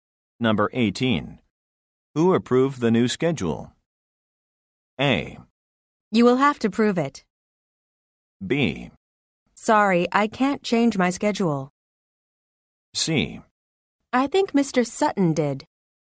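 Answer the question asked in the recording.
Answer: C: I think Mr. Sutton did.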